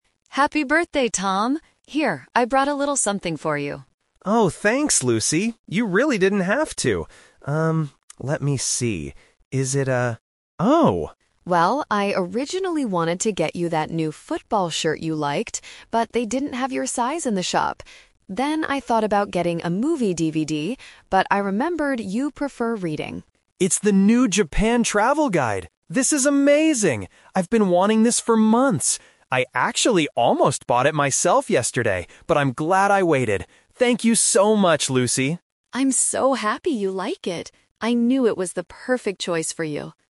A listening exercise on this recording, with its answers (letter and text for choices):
Listen to the conversation and choose the correct answer (A, B, or C).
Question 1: What did Lucy first want to buy for Tom?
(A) A movie DVD.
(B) A football shirt.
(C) A travel guide.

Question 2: Why didn't Lucy buy the first gift she thought of?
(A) It was too expensive.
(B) The shop was closed.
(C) They didn't have the right size.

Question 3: What is Tom's reaction to the book?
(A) He is very happy because he wanted it.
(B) He is disappointed because he bought it yesterday.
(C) He thinks it is too small for him.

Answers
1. (B) A football shirt.
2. (C) They didn't have the right size.
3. (A) He is very happy because he wanted it.

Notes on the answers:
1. Lucy says, "I originally wanted to get you that new football shirt." Trap: Option (A) is a trap because she "thought about" it later but it wasn't the first choice. Option (C) is the final gift, not the first idea.
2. Lucy explains, "but they didn't have your size in the shop." Trap: Options (A) and (B) are common reasons for not buying something, but they are not mentioned in the script.
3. Tom says, "This is amazing! I've been wanting this for months." Trap: Option (B) is a "Twist" trap. Tom mentioned "yesterday" and "bought", but he said he almost bought it, meaning he doesn't have it yet. Option (C) uses the word "size" from a different part of the story to confuse the listener.

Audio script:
Lucy: Happy Birthday, Tom! Here, I brought a little something for you.
Tom: Oh, thanks, Lucy! You really didn't have to. let me see. Is it a... oh!
Lucy: Well, I originally wanted to get you that new football shirt you liked, but they didn't have your size in the shop. Then I thought about getting a movie DVD, but I remembered you prefer reading.
Tom: It's the new Japan travel guide! This is amazing! I've been wanting this for months. I actually almost bought it myself yesterday, but I'm glad I waited. Thank you so much, Lucy!